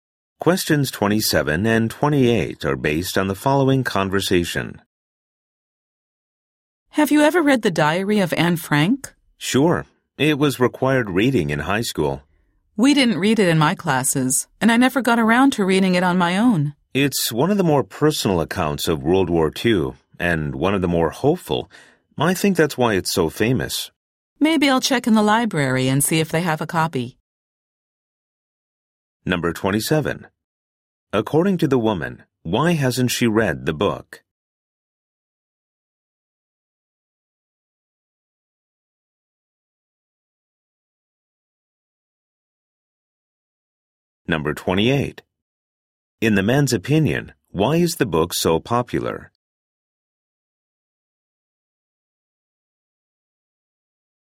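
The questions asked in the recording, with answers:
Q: According to the woman, why hasn't she read the book?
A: It wasn't assigned in her classes and she never got around to it

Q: In the man's opinion, why is the book so popular?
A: It is a personal and hopeful account of World War II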